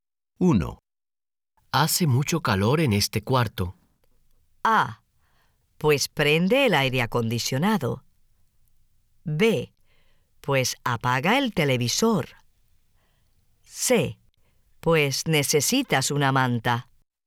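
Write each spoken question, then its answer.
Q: Hace mucho calor en este cuarto.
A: A: Pues prende el aire acondicionado.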